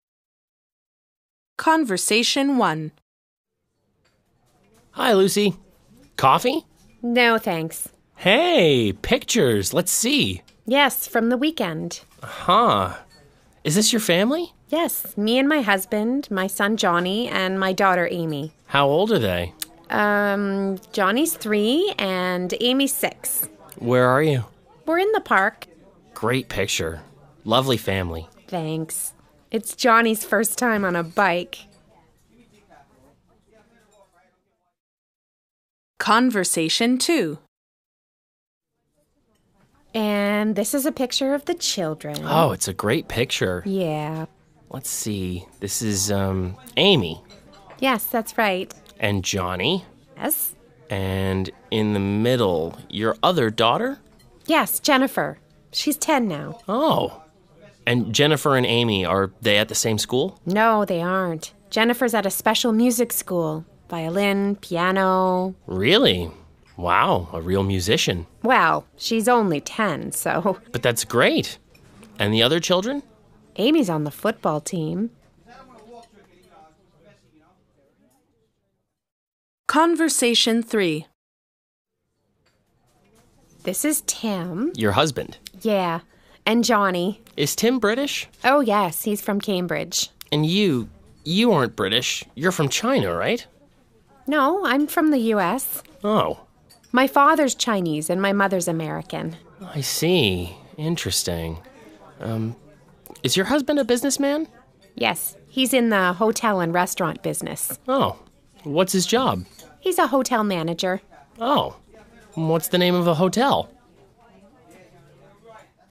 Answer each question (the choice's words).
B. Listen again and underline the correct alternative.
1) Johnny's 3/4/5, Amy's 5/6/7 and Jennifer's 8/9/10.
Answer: 3, 6, 10

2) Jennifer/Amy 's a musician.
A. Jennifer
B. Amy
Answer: Jennifer

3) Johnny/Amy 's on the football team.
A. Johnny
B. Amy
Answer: Amy

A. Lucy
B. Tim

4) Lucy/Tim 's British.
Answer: Tim

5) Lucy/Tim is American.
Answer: Lucy

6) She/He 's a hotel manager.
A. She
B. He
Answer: He